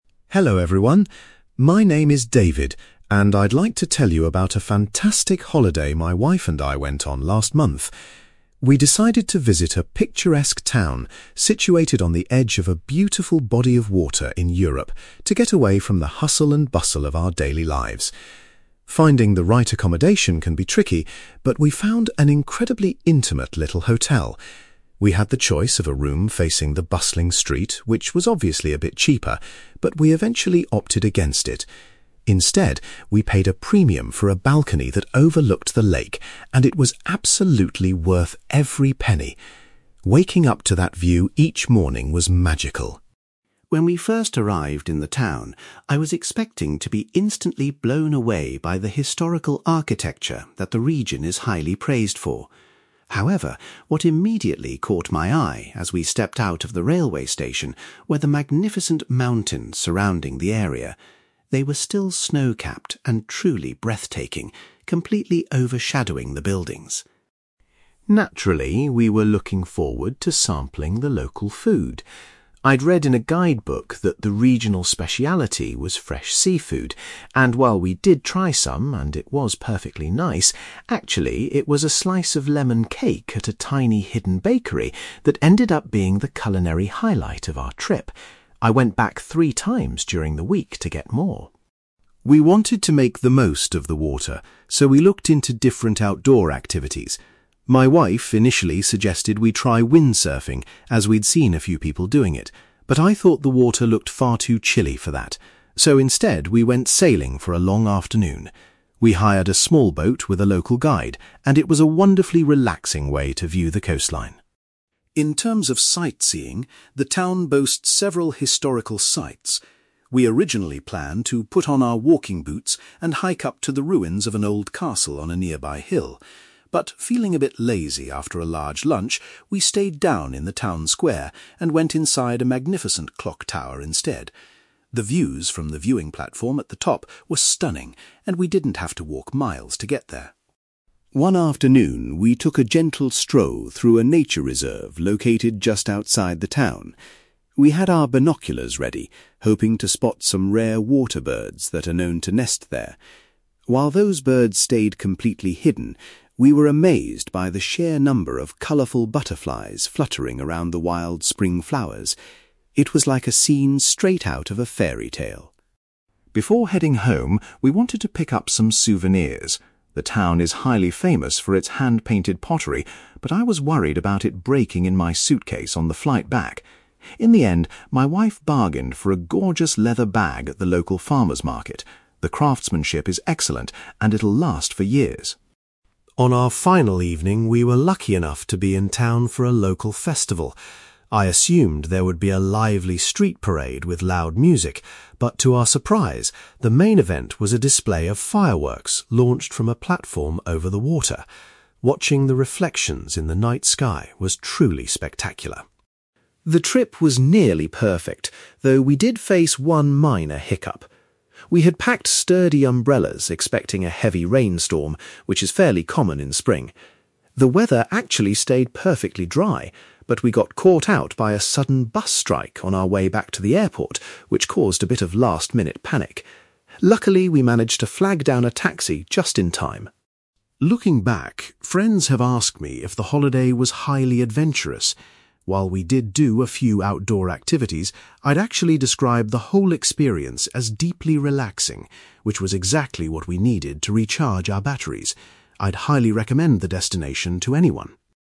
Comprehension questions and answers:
You will hear a man called David talking about a holiday he took with his wife. For questions 9-18, complete the sentences with a word or short phrase.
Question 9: David and his wife decided to stay in a hotel room with a view of the (9)........................... rather than a busy road.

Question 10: Upon his arrival, David was most impressed by the (10)........................... he saw.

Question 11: David says that a (11)........................... he bought in a bakery was his favourite thing to eat.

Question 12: Rather than doing other water sports, David and his wife chose to do some (12)........................... on the water.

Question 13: David changed his original sightseeing plans and decided to visit a (13)........................... in the centre of town.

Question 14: During a walk in a nature reserve, David was surprised to see lots of (14)........................... instead of birds.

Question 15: David's wife bought a beautiful (15)........................... as a souvenir of their trip.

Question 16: On their last night, David was surprised to see some (16)........................... as part of a festival.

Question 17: David says that a (17)........................... was the only issue they experienced during the trip.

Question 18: David says the word that best describes his holiday is '(18)...........................'.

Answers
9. lake
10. mountains
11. lemon cake
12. sailing
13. clock tower
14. butterflies
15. leather bag
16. fireworks
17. bus strike
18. relaxing

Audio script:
David: Hello everyone. My name is David, and I'd like to tell you about a fantastic holiday my wife and I went on last month. We decided to visit a picturesque town situated on the edge of a beautiful body of water in Europe to get away from the hustle and bustle of our daily lives. Finding the right accommodation can be tricky, but we found an incredibly intimate little hotel. We had the choice of a room facing the bustling street, which was obviously a bit cheaper, but we eventually opted against it. Instead, we paid a premium for a balcony that overlooked the lake, and it was absolutely worth every penny. Waking up to that view each morning was magical.
When we first arrived in the town, I was expecting to be instantly blown away by the historical architecture that the region is highly praised for. However, what immediately caught my eye as we stepped out of the railway station were the magnificent mountains surrounding the area. They were still snow-capped and truly breathtaking, completely overshadowing the buildings.
Naturally, we were looking forward to sampling the local food. I'd read in a guidebook that the regional speciality was fresh seafood, and while we did try some and it was perfectly nice, actually, it was a slice of lemon cake at a tiny, hidden bakery that ended up being the culinary highlight of our trip. I went back three times during the week to get more!
We wanted to make the most of the water, so we looked into different outdoor activities. My wife initially suggested we try windsurfing, as we'd seen a few people doing it, but I thought the water looked far too chilly for that. So, instead, we went sailing for a long afternoon. We hired a small boat with a local guide, and it was a wonderfully relaxing way to view the coastline.
In terms of sightseeing, the town boasts several historical sites. We originally planned to put on our walking boots and hike up to the ruins of an old castle on a nearby hill. But, feeling a bit lazy after a large lunch, we stayed down in the town square and went inside a magnificent clock tower instead. The views from the viewing platform at the top were stunning, and we didn't have to walk miles to get there.
One afternoon, we took a gentle stroll through a nature reserve located just outside the town. We had our binoculars ready, hoping to spot some rare water birds that are known to nest there. While those birds stayed completely hidden, we were amazed by the sheer number of colourful butterflies fluttering around the wild spring flowers. It was like a scene straight out of a fairy tale.
Before heading home, we wanted to pick up some souvenirs. The town is highly famous for its hand-painted pottery, but I was worried about it breaking in my suitcase on the flight back. In the end, my wife bargained for a gorgeous leather bag at the local farmers' market. The craftsmanship is excellent and it'll last for years.
On our final evening, we were lucky enough to be in town for a local festival. I assumed there would be a lively street parade with loud music, but to our surprise, the main event was a display of fireworks launched from a platform over the water. Watching the reflections in the night sky was truly spectacular.
The trip was nearly perfect, though we did face one minor hiccup. We had packed sturdy umbrellas expecting a heavy rainstorm, which is fairly common in spring. The weather actually stayed perfectly dry, but we got caught out by a sudden bus strike on our way back to the airport, which caused a bit of last-minute panic! Luckily, we managed to flag down a taxi just in time.
Looking back, friends have asked me if the holiday was highly adventurous. While we did do a few outdoor activities, I'd actually describe the whole experience as deeply relaxing, which was exactly what we needed to recharge our batteries. I'd highly recommend the destination to anyone!

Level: B2